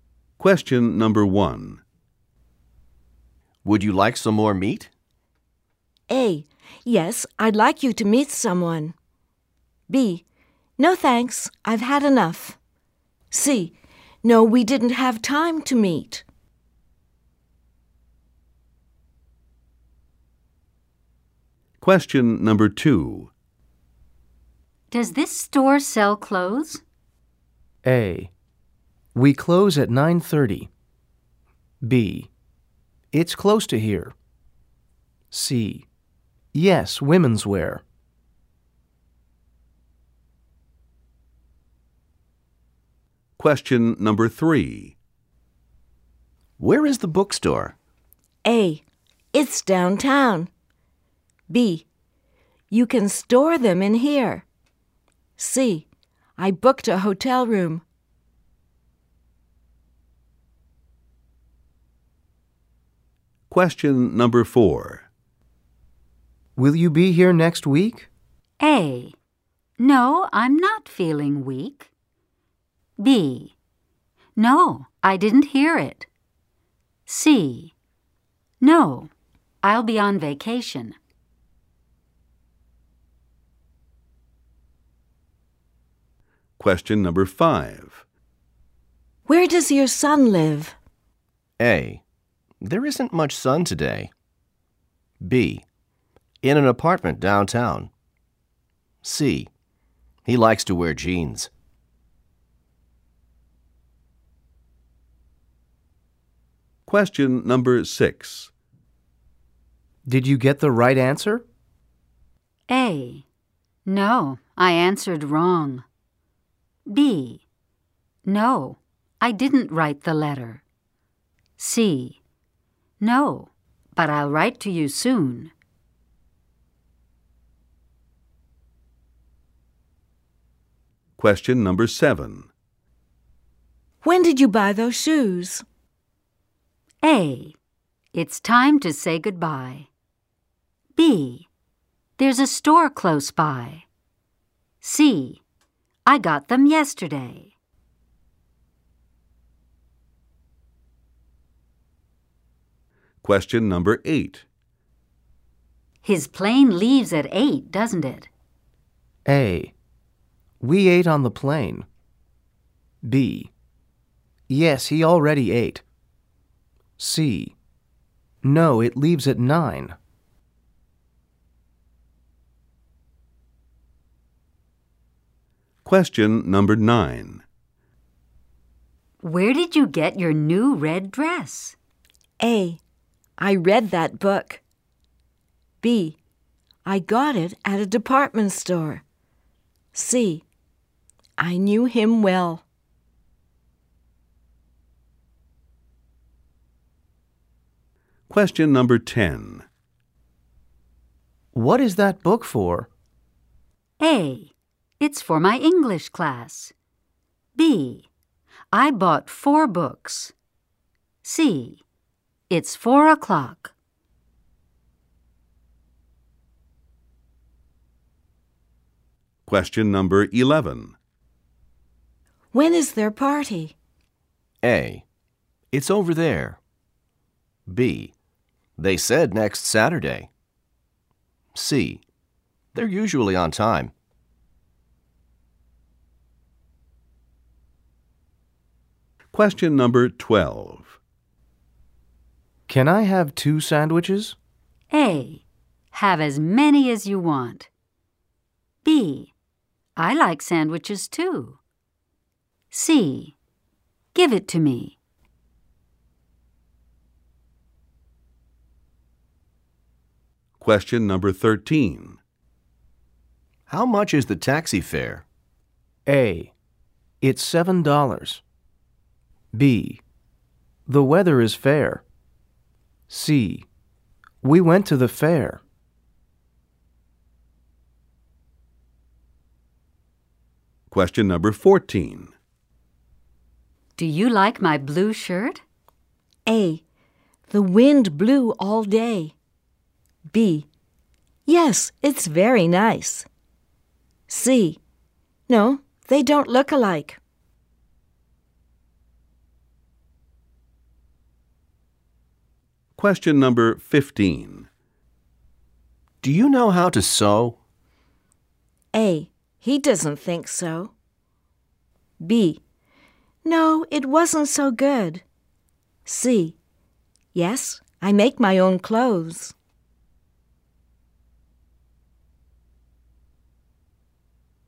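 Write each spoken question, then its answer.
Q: Would you like some more meat?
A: B: No thanks, I've had enough.

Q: Does this store sell clothes?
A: C: Yes, women's wear.

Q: Where is the bookstore?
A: A: It's downtown.

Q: Will you be here next week?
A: C: No, I'll be on vacation.

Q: Where does your son live?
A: B: In an apartment downtown.

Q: Did you get the right answer?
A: A: No, I answered wrong.

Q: When did you buy those shoes?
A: C: I got them yesterday.

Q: His plane leaves at 8, doesn't it?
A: C: No, it leaves at 9.

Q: Where did you get your new red dress?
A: B: I got it at a department store.

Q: What is that book for?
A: A: It's for my English class.

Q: When is their party?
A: B: They said next Saturday.

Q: Can I have 2 sandwiches?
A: A: Have as many as you want.

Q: How much is the taxi fare?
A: A: It's $7.

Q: Do you like my blue shirt?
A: B: Yes, it's very nice.

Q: Do you know how to sew?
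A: C: Yes, I make my own clothes.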